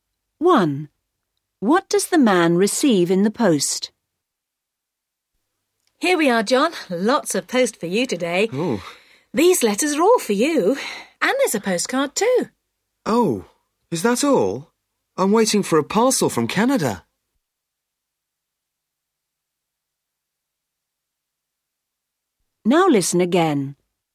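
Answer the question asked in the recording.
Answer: Letters and a postcard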